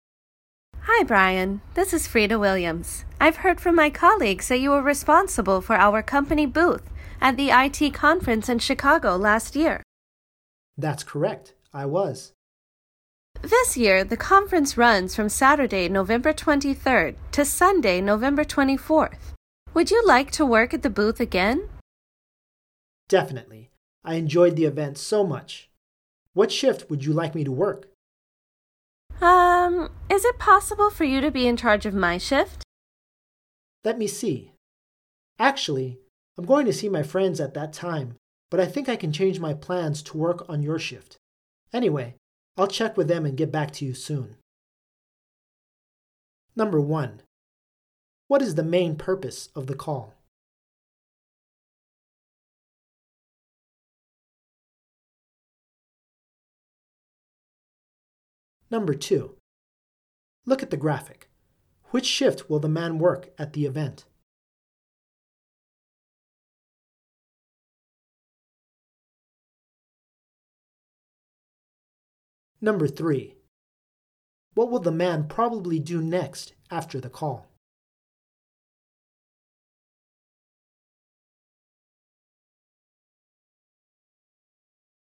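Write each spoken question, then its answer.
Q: What is the main purpose of the call?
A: To ask Brian to work at the company booth at the IT conference again

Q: What will the man probably do next after the call?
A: Check with his friends about changing his plans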